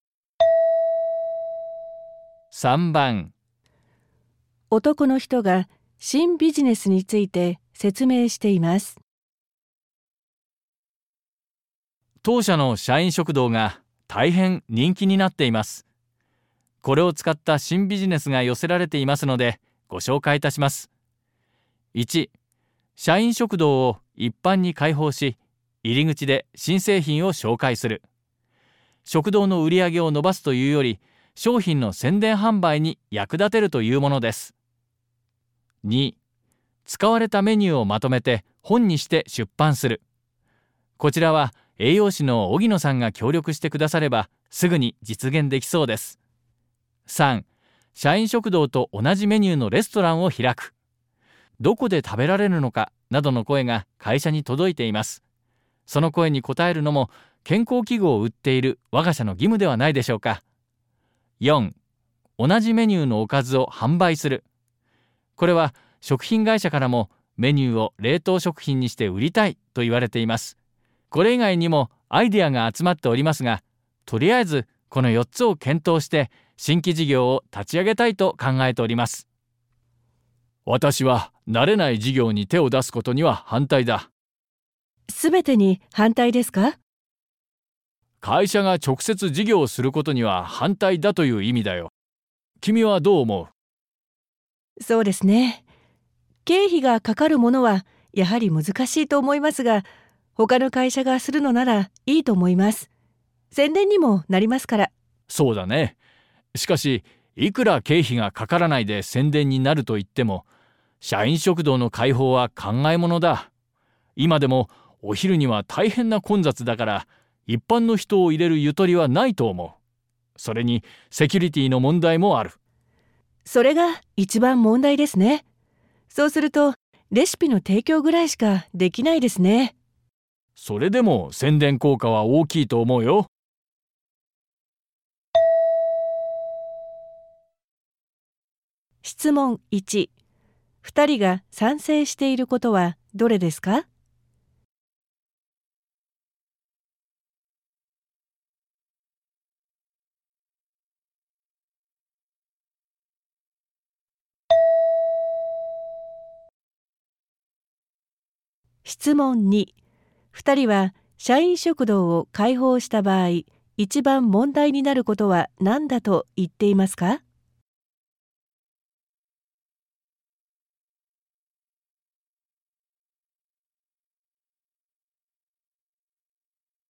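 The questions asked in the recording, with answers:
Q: 2人は社員食堂を開放した場合、一番問題になることは何だと言っていますか?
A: セキュリティの問題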